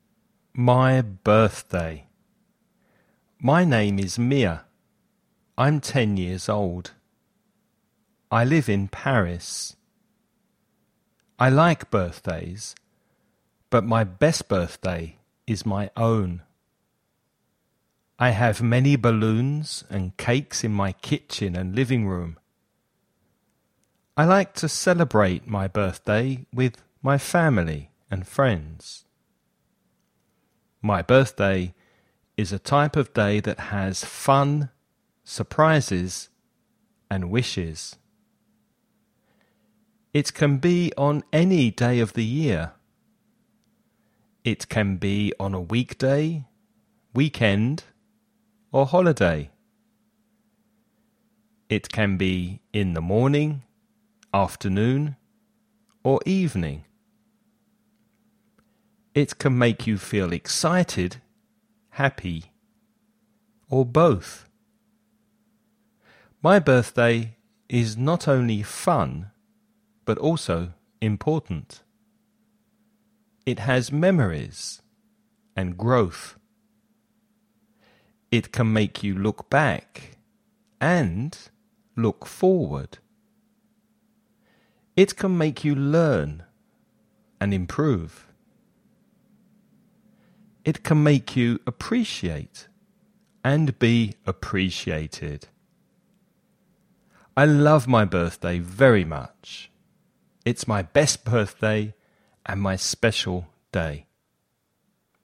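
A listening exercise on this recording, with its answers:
Escucha y contesta las siguientes preguntas.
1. Where does Mia live?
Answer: In Paris.

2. What is her best birthday?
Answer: Her own birthday.

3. What are some things that her birthday has?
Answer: Fun, surprises and wishes.

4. What are some things that her birthday can be?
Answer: On any day: a weekday, weekend or holiday; in the morning, afternoon or evening.

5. How does her birthday make Mia important?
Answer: It has memories and growth; it makes her look back and forward, learn and improve, and appreciate and be appreciated.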